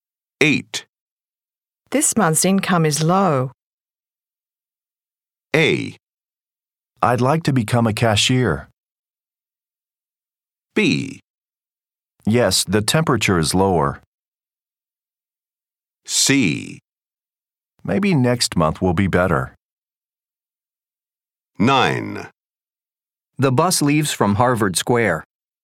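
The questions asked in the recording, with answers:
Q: This month's income is low.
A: C: Maybe next month will be better.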